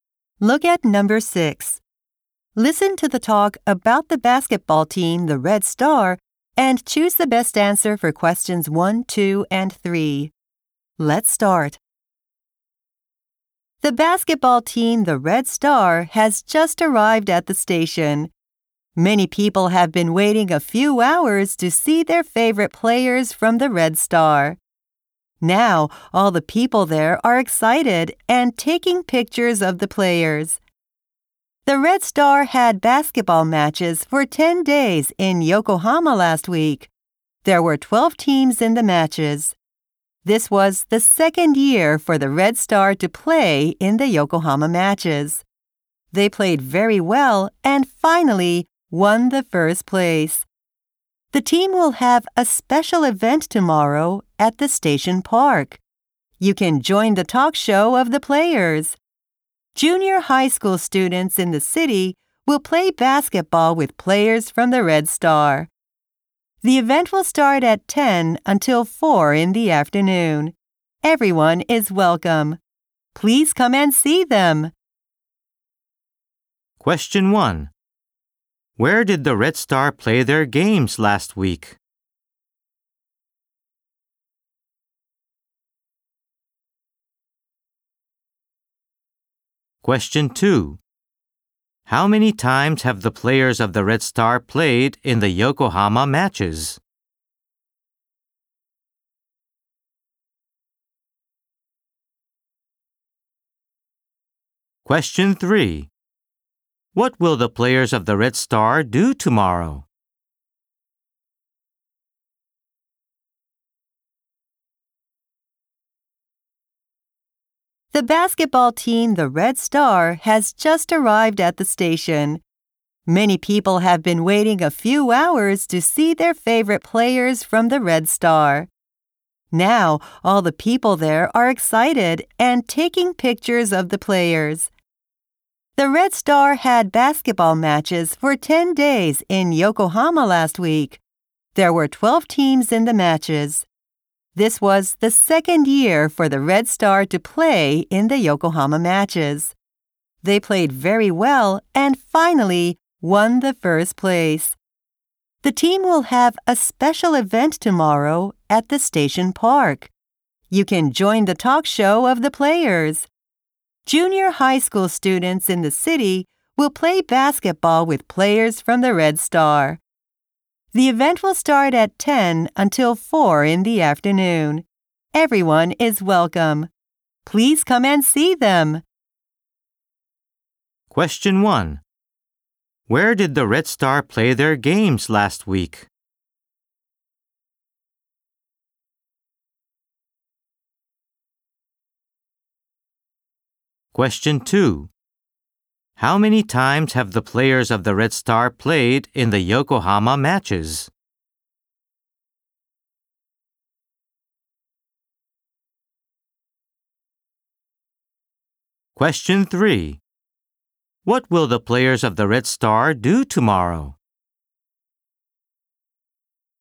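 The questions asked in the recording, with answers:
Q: Question 1. Where did the Red Star play their games last week?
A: In Yokohama

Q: Question 2. How many times have the players of the Red Star played in the Yokohama matches?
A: Twice

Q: Question 3. What will the players of the Red Star do tomorrow?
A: Have a special event at the station park, with a talk show and playing basketball with junior high school students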